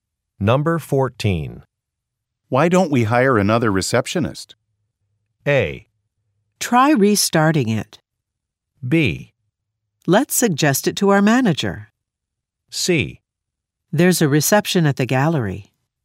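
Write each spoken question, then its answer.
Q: Why don't we hire another receptionist?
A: B: Let's suggest it to our manager.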